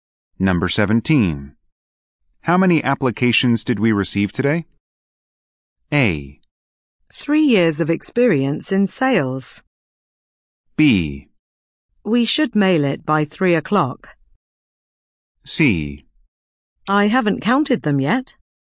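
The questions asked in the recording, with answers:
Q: How many applications did we receive today?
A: C: I haven't counted them yet.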